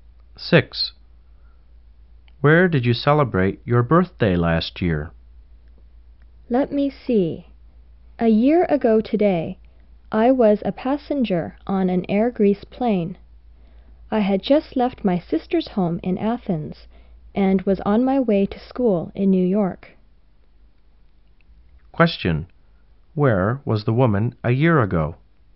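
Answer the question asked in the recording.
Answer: On a plane from Athens to New York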